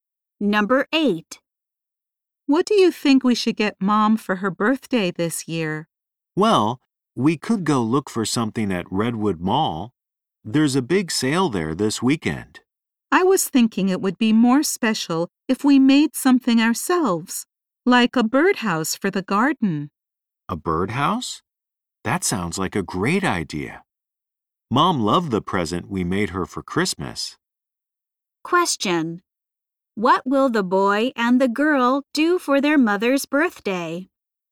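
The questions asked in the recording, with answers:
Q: What will the boy and the girl do for their mother's birthday?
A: Make her a birdhouse for the garden.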